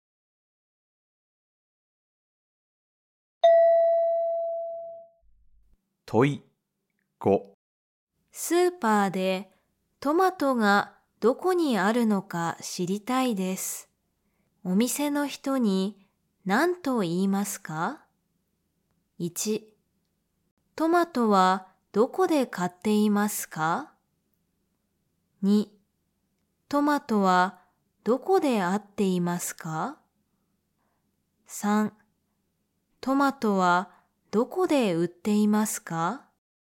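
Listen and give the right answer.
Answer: 3: トマトはどこで売っていますか?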